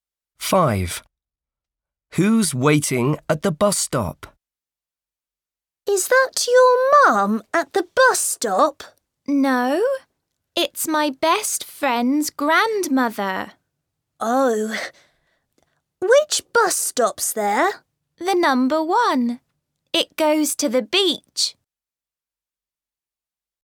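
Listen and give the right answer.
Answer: his best friend's grandmother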